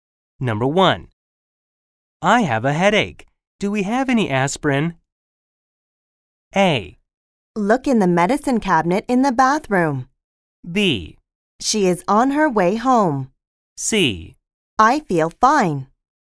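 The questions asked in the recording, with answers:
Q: I have a headache. Do we have any aspirin?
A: A: Look in the medicine cabinet in the bathroom.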